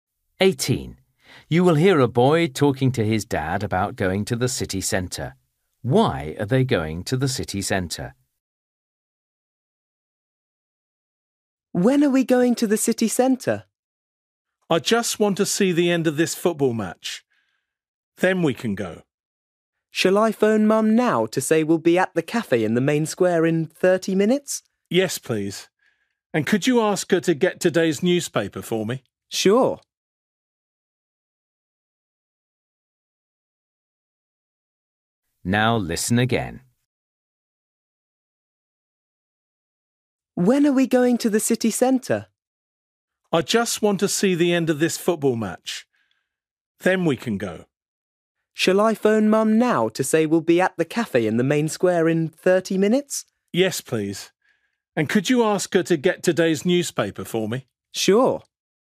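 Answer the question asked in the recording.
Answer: to meet Mum at the cafe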